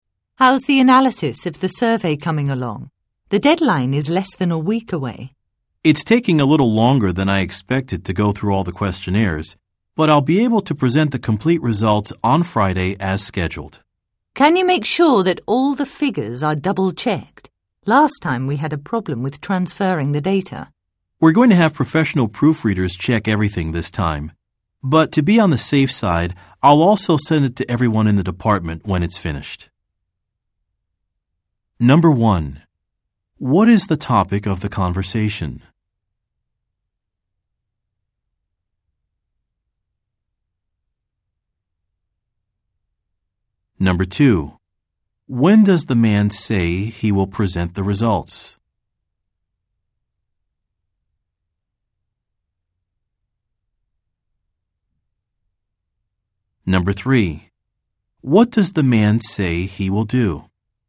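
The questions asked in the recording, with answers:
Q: What is the topic of the conversation?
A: The analysis of a survey

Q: When does the man say he will present the results?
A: On Friday

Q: What does the man say he will do?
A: Send the results to everyone in the department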